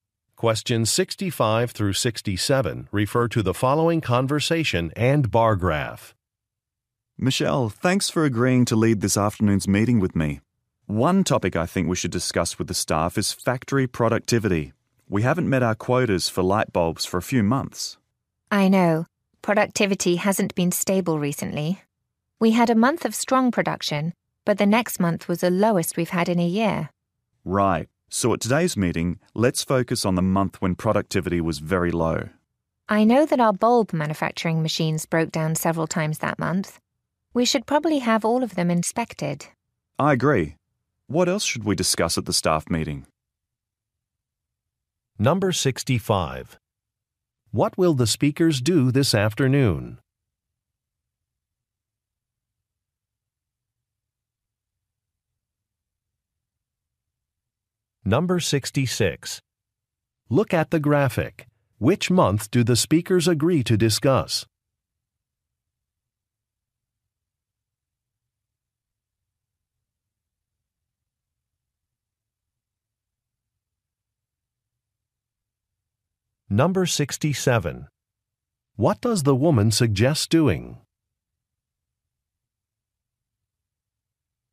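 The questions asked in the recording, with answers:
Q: What will the speakers do this afternoon?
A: Lead a staff meeting

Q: What does the woman suggest doing?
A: Having the machines inspected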